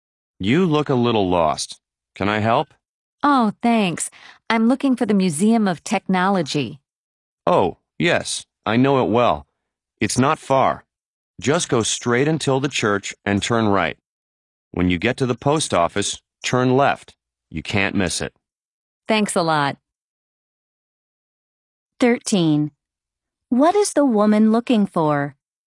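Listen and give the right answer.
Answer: The Museum of Technology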